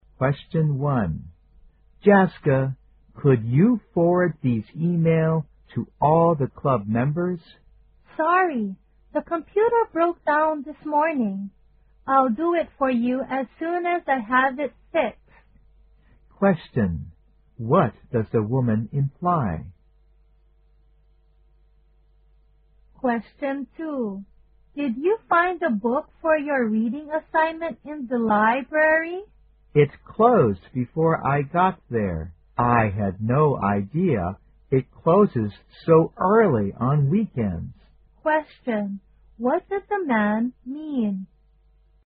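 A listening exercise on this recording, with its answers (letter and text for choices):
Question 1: What does the woman imply?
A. She has to post a letter instead.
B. She has to turn down the man's request.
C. She's not sure if the computer is fixed.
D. She can't send the message right now.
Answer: D. She can't send the message right now.

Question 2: What does the man mean?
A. He didn't get the book he needed.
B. He had no idea where the book was.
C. The library is closed on weekends.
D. He was not allowed to check out the book.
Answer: A. He didn't get the book he needed.

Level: 大学英语四级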